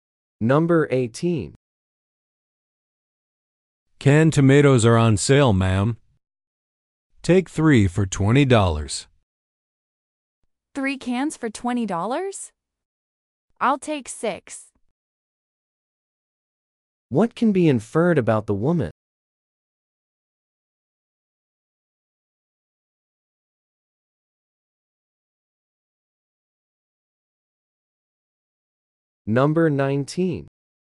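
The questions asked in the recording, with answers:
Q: What can be inferred about the woman?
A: She will buy 6 cans of tomatoes.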